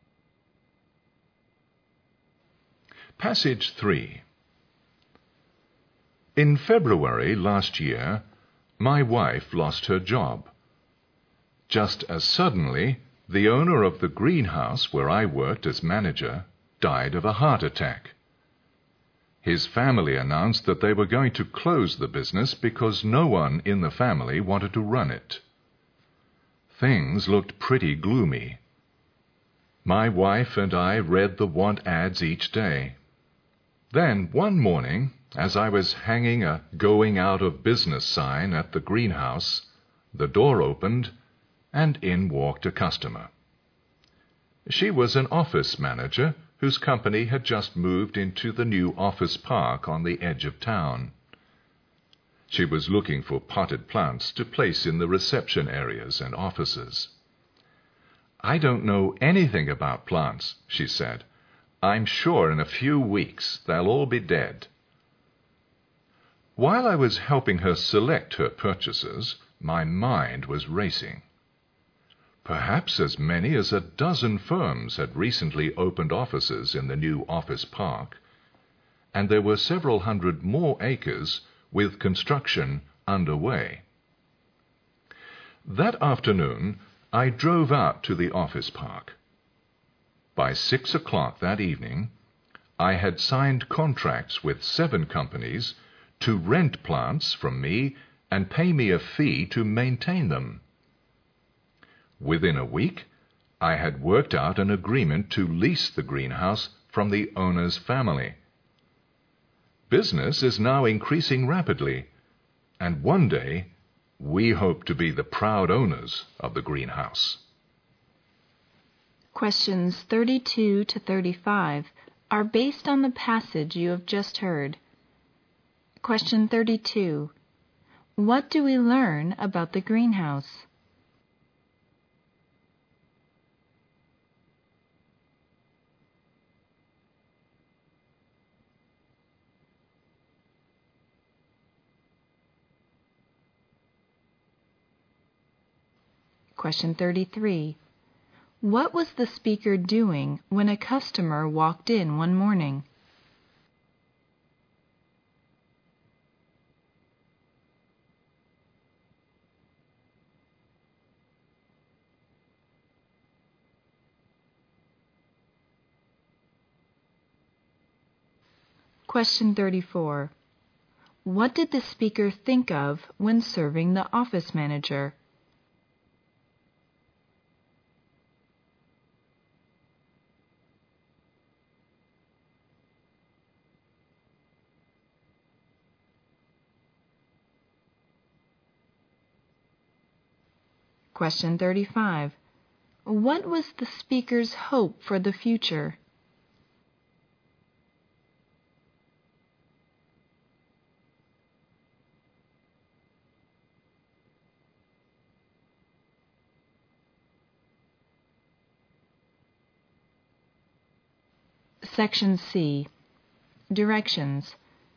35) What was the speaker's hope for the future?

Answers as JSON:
{"35": "He hopes to be the proud owner of the green house."}

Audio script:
Passage three
In February last year, my wife lost her job. Just as suddenly, the owner of the greenhouse where I worked as manager died of a heart attack. His family announced that they were going to close the business because no one in the family wanted to run it. Things looked pretty gloomy. My wife and I read the want-ads each day. Then one morning, as I was hanging out "Going out of Business" sign at the greenhouse, the door opened and in walked a customer. She was an office manager whose company has just moved into the new office park on the edge of town. She was looking for petite plants to place in the reception areas and offices. "I don't know anything about plants," she said. "I'm sure in a few weeks they'll all be dead." Why was I helping her select her purchases? My mind was racing. Perhaps as many as a dozen firms have recently opened offices in the new office park, and there were several hundred more acres with construction under way. That afternoon, I drove out to the office park. By six o'clock that evening I had signed contracts with seven companies to rent plants from me and pay me a fee to maintain them. Within a week, I had worked out an agreement to lease the greenhouse from the owner's family. Business is now increasing rapidly.
And one day, we hope to be the proud owners of the greenhouse.
32.What do we learn about the greenhouse?
It is a place where we can buy plants.
33. What was the speaker doing when the customer walked in one morning?
34 What did the speaker think of when serving the office manager?